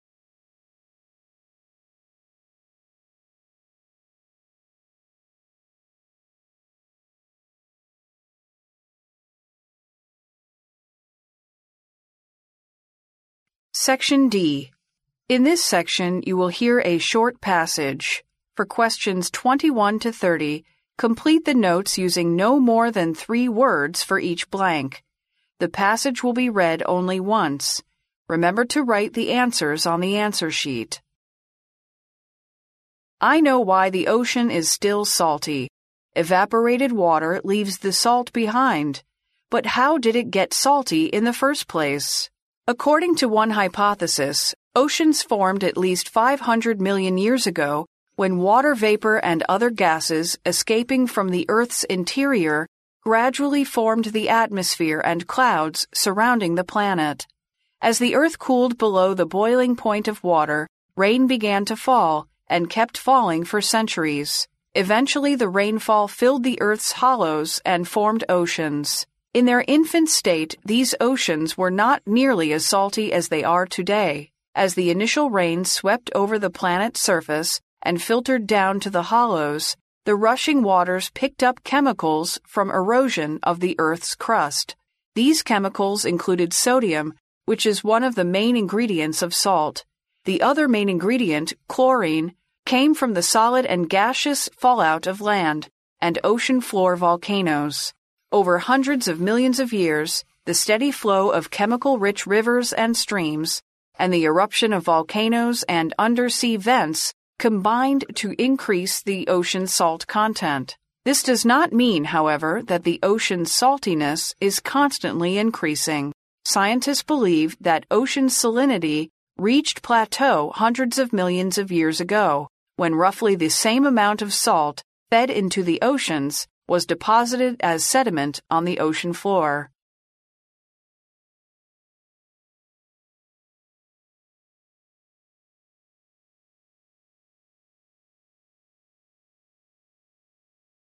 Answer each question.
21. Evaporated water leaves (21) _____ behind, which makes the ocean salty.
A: the salt

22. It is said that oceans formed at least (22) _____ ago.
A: 500 million years

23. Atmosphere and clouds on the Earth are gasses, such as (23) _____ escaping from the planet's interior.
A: water vapor

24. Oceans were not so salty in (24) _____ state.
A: their infant

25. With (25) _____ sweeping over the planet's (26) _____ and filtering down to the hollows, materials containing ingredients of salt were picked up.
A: the initial rains

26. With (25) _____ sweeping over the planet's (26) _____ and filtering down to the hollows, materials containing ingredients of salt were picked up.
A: surface

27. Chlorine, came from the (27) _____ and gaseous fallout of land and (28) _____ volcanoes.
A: solid

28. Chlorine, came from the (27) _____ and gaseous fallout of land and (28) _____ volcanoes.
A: ocean floor

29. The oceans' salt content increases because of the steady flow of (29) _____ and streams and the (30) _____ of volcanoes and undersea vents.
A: chemical-rich rivers

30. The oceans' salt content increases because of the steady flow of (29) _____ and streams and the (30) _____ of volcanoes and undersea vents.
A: eruption

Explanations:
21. 录音一开始就陈述了海水仍然是咸的,水分蒸发后盐分却还留在海里(evaporated water leaves the salt behind),因此应填the salt。
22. 录音中谈及了一种假想,即海洋形成于5亿年前,所以对应该空应填写500 million years。
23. 录音中探究了海水是如何一开始变咸的,提到了5亿年前,水蒸气和其他气体从地球内部散发出来,便逐渐形成了大气和云层,对应空格得知应填写water vapor。
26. 参考25题,所以此空填写surface。
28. 参考27题,所以此空填写ocean floor。
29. 由录音原文"the steady flow of chemical-rich rivers and streams and the eruption of volcanoes and the undersea vents combined to increase the ocean's salt content"可知,数亿年以来,富含化学物质的河川的稳定流动,以及陆地和海底火山的喷发都促成了海洋盐分的增加。所以此空填写chemical-rich rivers。
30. 参考29题,同样可得此空填写eruption。

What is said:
I know why the ocean is still salty: evaporated water leaves the salt behind. But how did it get salty in the first place?
According to one hypothesis, oceans formed at least 500 million year ago when water vapor and other gasses escaped from the Earth's interior gradually formed the atmosphere and clouds surrounding the planet. As the earth cooled below the boiling point of water, rain began to fall, and kept falling for centuries. Eventually the rainfall filled the Earth's hollows and formed oceans.
In their infant state these oceans were not nearly as salty as they are today. As the initial rains swept over the planet's surface and filtered down to the hollows, the rushing waters picked up chemicals from erosion of the Earth's crust. These chemicals included sodium, which is one of the main ingredients of salt. The other main ingredient, chlorine, came from the solid and gaseous fallout of land and ocean floor volcanoes. Over hundreds of millions of years, the steady flow of chemical-rich rivers and streams and the eruption of volcanoes and the undersea vents combined to increase the ocean's salt content.
This does not mean, however, that the oceans' saltiness is constantly increasing. Scientists believe that ocean salinity reached plateau hundreds of millions of years ago, when roughly the same amount of salt fed into the oceans was deposited as sediment on the ocean floor.